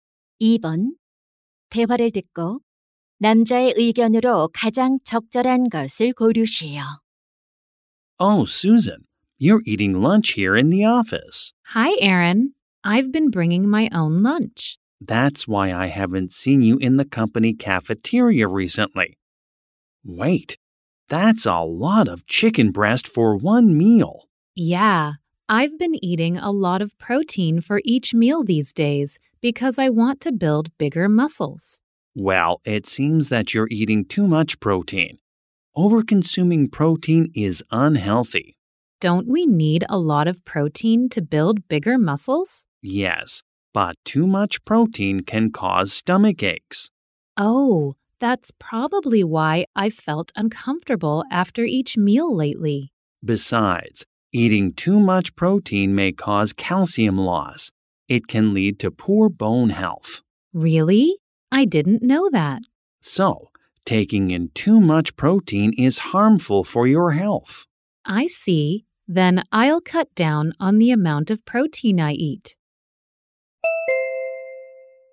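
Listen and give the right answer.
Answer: 단백질을 과다 섭취하면 건강에 해롭다.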